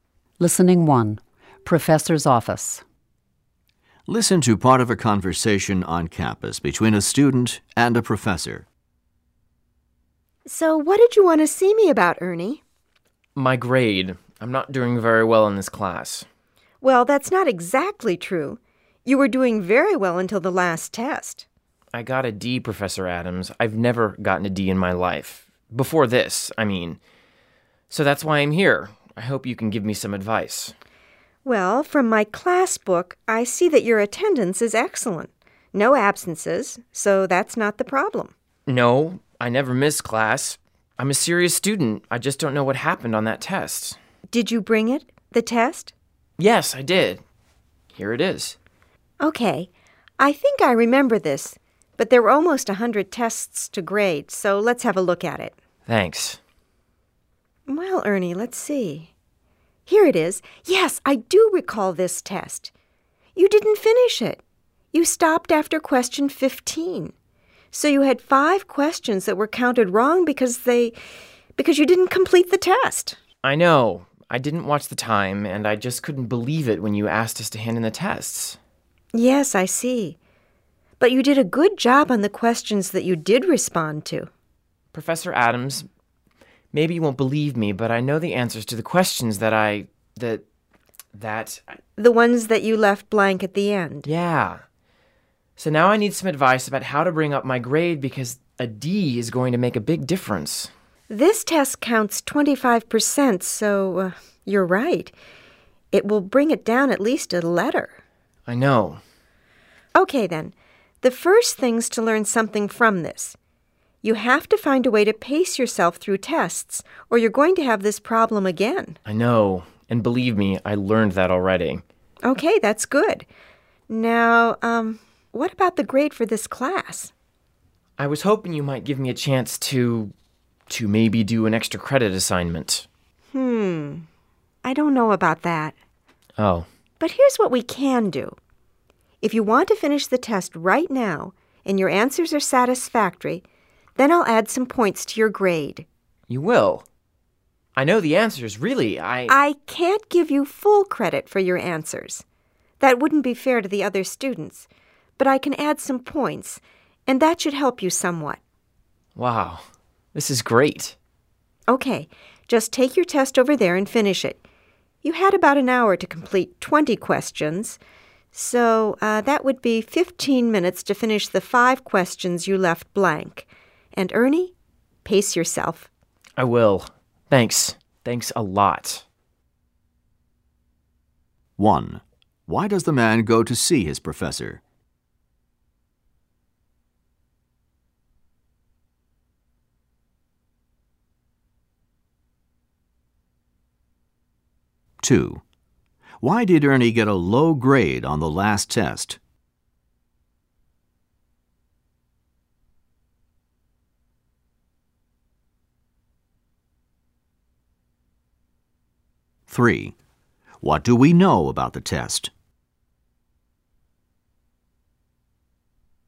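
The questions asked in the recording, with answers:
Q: Why does the man go to see his professor?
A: To get advice about raising his grade after a bad test

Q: Why did Ernie get a low grade on the last test?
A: He did not finish the test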